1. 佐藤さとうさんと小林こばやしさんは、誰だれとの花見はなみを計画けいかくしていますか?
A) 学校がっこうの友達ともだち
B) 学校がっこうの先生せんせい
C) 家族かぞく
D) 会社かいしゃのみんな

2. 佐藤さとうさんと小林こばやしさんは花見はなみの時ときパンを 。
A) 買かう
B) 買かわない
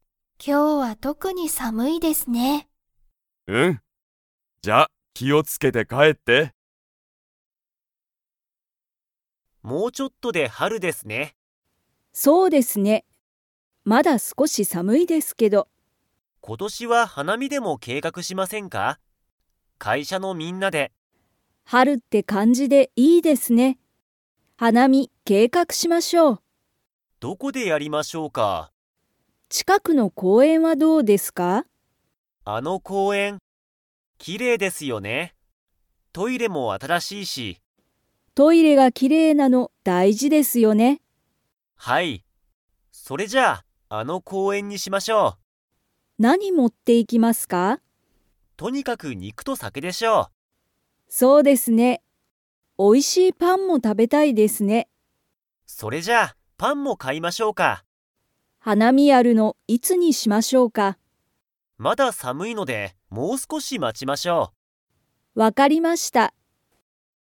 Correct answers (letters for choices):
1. D
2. A

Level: Level 4